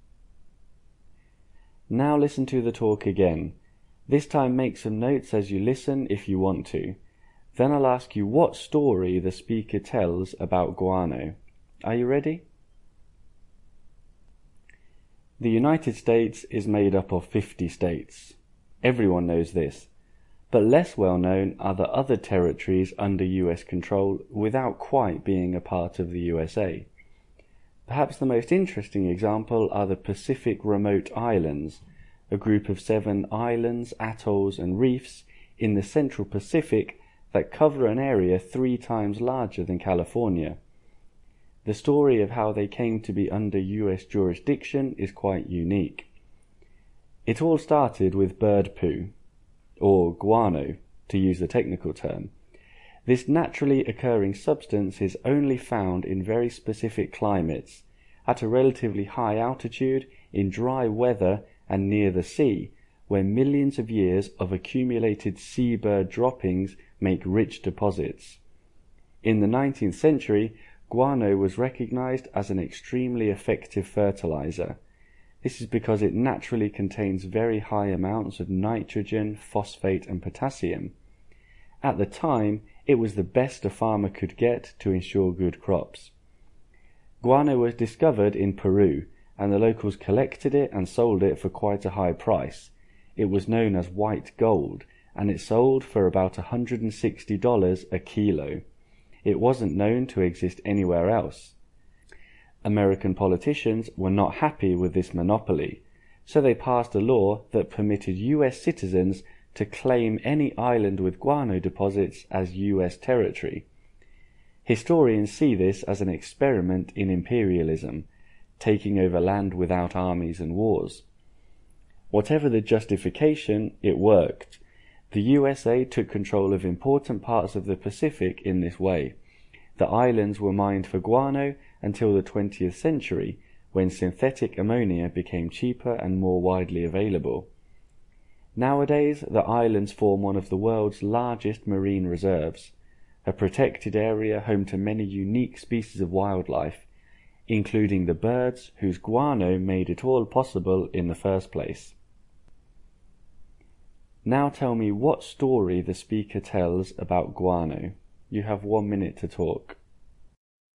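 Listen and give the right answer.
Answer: Guano was a valuable fertilizer, sold only by Peru, so the US passed a law letting citizens claim guano islands, which is how it gained the Pacific Remote Islands; they were mined until synthetic ammonia replaced it and are now a marine reserve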